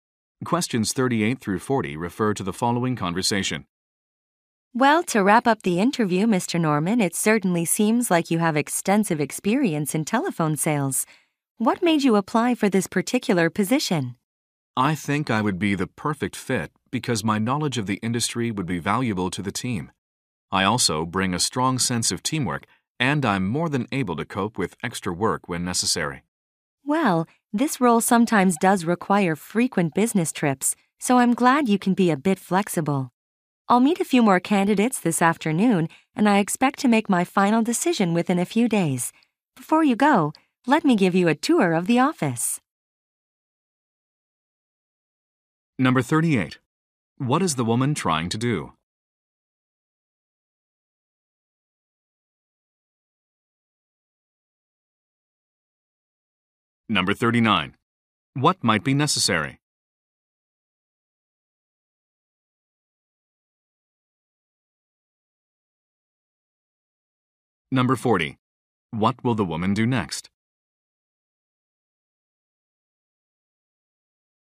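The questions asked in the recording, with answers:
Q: What is the woman trying to do?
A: Hire someone for a telephone sales position

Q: What might be necessary?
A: Frequent business trips

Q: What will the woman do next?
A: Give the man a tour of the office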